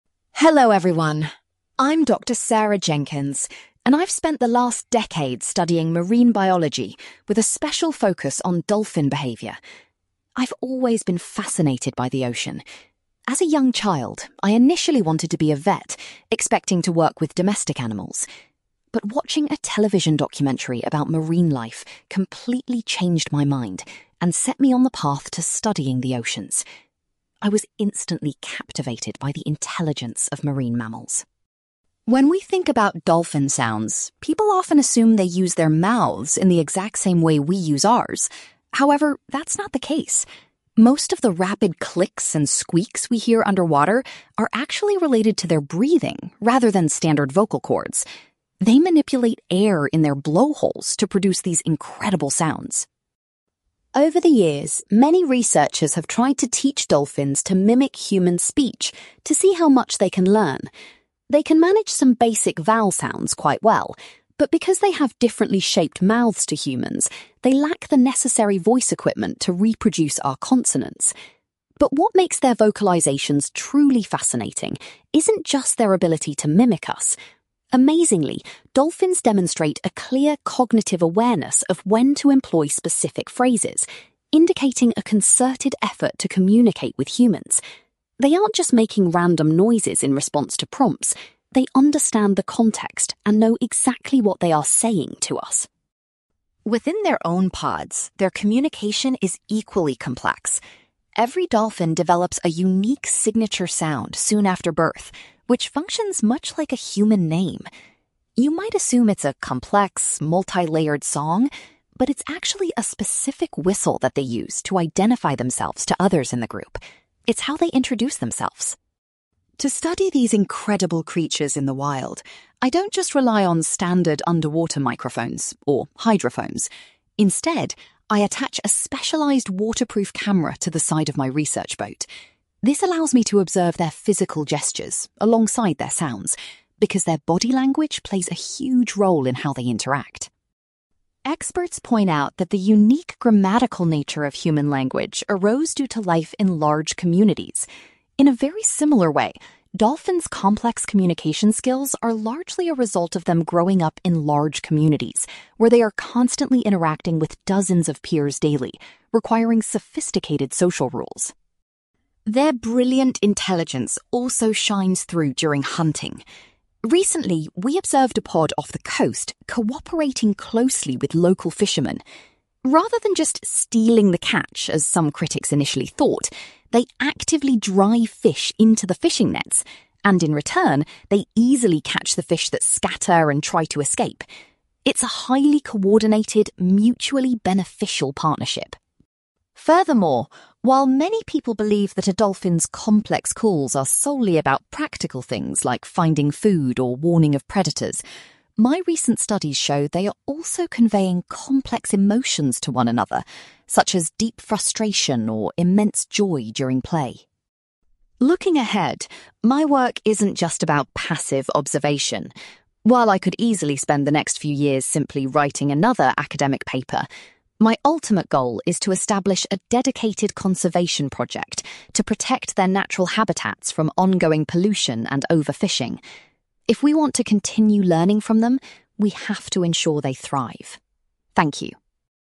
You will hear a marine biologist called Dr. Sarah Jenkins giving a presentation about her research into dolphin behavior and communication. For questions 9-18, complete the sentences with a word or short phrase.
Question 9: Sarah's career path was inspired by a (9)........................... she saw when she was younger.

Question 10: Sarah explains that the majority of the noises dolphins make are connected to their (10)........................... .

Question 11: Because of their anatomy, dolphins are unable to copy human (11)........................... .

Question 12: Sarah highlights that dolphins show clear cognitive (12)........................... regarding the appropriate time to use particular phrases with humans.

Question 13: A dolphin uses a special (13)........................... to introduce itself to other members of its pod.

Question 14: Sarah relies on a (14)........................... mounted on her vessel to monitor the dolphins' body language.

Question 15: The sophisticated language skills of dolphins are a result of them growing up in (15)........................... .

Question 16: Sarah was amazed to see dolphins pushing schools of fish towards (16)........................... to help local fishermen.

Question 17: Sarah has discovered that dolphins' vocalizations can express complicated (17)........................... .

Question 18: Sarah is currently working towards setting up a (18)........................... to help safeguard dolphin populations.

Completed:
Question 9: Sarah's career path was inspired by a television documentary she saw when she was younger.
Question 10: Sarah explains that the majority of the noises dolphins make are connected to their breathing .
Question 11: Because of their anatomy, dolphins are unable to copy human consonants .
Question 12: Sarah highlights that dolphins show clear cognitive awareness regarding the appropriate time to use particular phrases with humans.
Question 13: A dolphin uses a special whistle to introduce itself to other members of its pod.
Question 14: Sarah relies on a waterproof camera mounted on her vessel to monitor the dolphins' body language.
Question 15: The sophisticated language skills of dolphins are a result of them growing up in large communities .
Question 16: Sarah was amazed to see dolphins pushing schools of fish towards fishing nets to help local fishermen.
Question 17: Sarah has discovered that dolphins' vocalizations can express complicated emotions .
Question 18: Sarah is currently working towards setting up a conservation project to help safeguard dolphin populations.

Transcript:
Dr. Sarah Jenkins: Hello everyone, I'm Dr. Sarah Jenkins, and I've spent the last decade studying marine biology, with a special focus on dolphin behavior. I've always been fascinated by the ocean. As a young child, I initially wanted to be a vet, expecting to work with domestic animals. But watching a television documentary about marine life completely changed my mind and set me on the path to studying the oceans. I was instantly captivated by the intelligence of marine mammals.
When we think about dolphin sounds, people often assume they use their mouths in the exact same way we use ours. However, that's not the case. Most of the rapid clicks and squeaks we hear underwater are actually related to their breathing rather than standard vocal cords. They manipulate air in their blowholes to produce these incredible sounds.
Over the years, many researchers have tried to teach dolphins to mimic human speech to see how much they can learn. They can manage some basic vowel sounds quite well. But because they have differently shaped mouths to humans, they lack the necessary voice equipment to reproduce our consonants. But what makes their vocalizations truly fascinating isn't just their ability to mimic us. Amazingly, dolphins demonstrate a clear cognitive awareness of when to employ specific phrases, indicating a concerted effort to communicate with humans. They aren't just making random noises in response to prompts; they understand the context and know exactly what they are 'saying' to us.
Within their own pods, their communication is equally complex. Every dolphin develops a unique signature sound soon after birth, which functions much like a human name. You might assume it's a complex, multi-layered song, but it's actually a specific whistle that they use to identify themselves to others in the group. It's how they introduce themselves.
To study these incredible creatures in the wild, I don't just rely on standard underwater microphones, or hydrophones. Instead, I attach a specialized waterproof camera to the side of my research boat. This allows me to observe their physical gestures alongside their sounds, because their body language plays a huge role in how they interact.
Experts point out that the unique grammatical nature of human language arose due to life in large communities. In a very similar way, dolphins' complex communication skills are largely a result of them growing up in large communities, where they are constantly interacting with dozens of peers daily, requiring sophisticated social rules.
Their brilliant intelligence also shines through during hunting. Recently, we observed a pod off the coast cooperating closely with local fishermen. Rather than just stealing the catch as some critics initially thought, they actively drive fish into the fishing nets, and in return, they easily catch the fish that scatter and try to escape. It's a highly coordinated, mutually beneficial partnership.
Furthermore, while many people believe that a dolphin's complex calls are solely about practical things like finding food or warning of predators, my recent studies show they are also conveying complex emotions to one another, such as deep frustration or immense joy during play.
Looking ahead, my work isn't just about passive observation. While I could easily spend the next few years simply writing another academic paper, my ultimate goal is to establish a dedicated conservation project to protect their natural habitats from ongoing pollution and overfishing. If we want to continue learning from them, we have to ensure they thrive. Thank you.

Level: B2